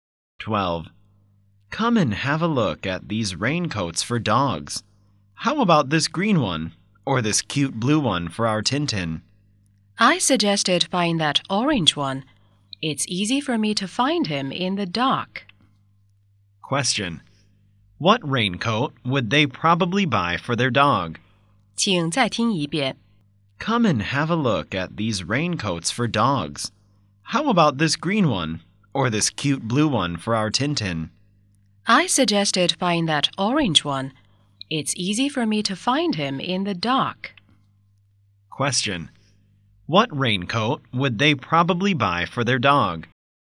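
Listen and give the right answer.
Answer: The orange one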